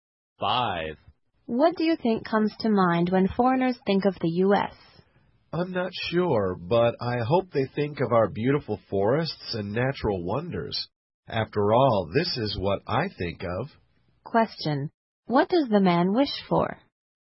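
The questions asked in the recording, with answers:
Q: What does the man wish for?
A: That foreigners think of America's beautiful forests and natural wonders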